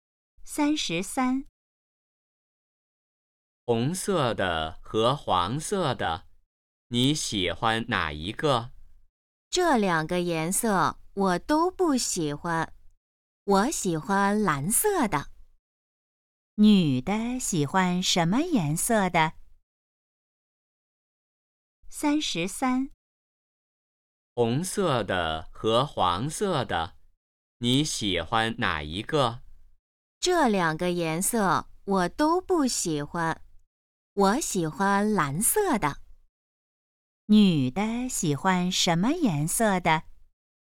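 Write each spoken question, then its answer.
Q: 女的喜欢什么颜色的?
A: 蓝色的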